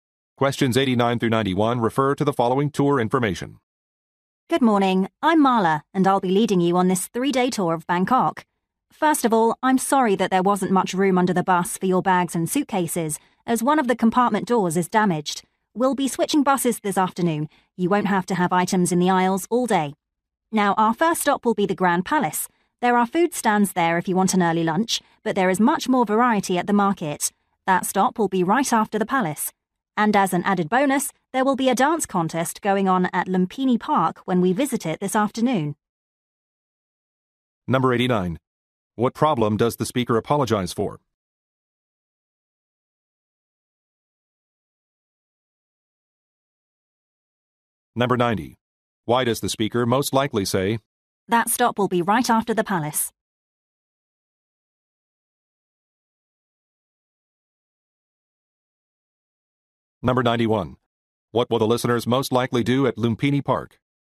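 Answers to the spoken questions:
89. Limited luggage space on the bus
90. To suggest waiting to eat lunch at the market
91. Watch a dance contest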